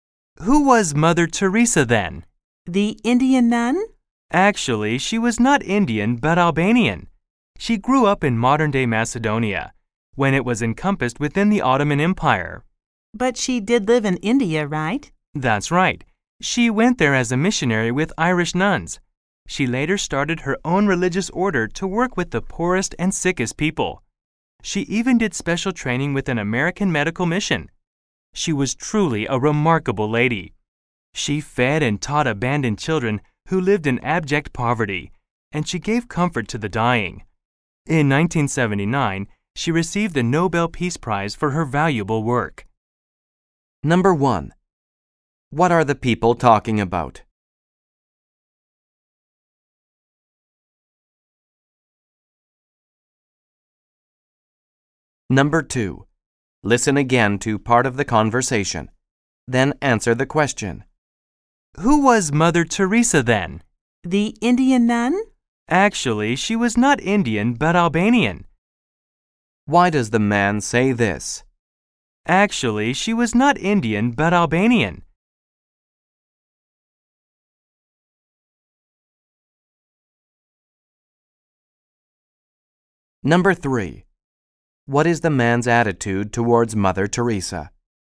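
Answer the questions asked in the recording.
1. The life and work of Mother Teresa
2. To correct the woman's mistaken belief that Mother Teresa was Indian
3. He admires her greatly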